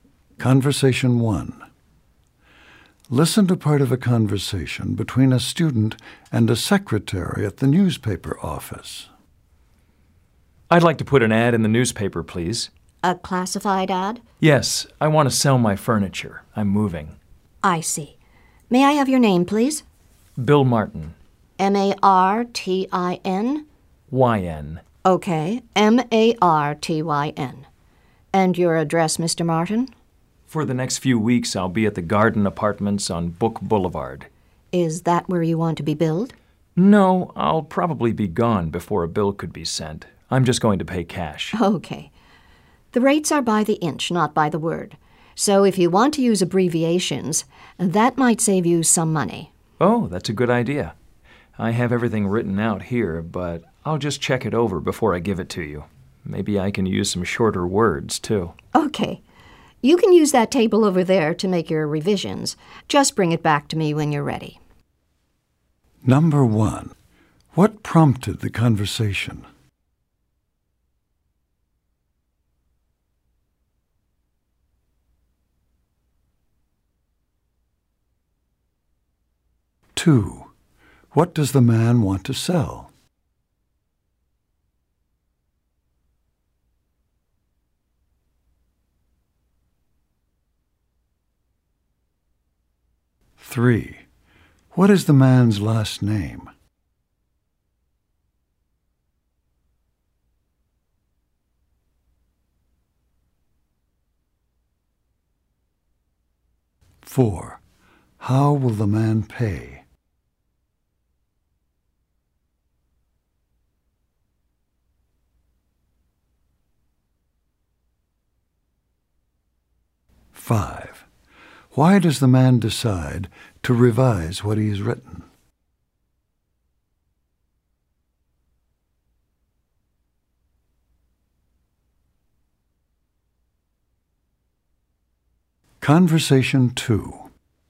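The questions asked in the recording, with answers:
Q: what prompted the conversation?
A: The man wants to put a classified ad in the newspaper.

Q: what does the man want to sell?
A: His furniture

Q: how will the man pay?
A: In cash

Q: Why does the man decide to revise what he has written?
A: To save money, because the rates are by the inch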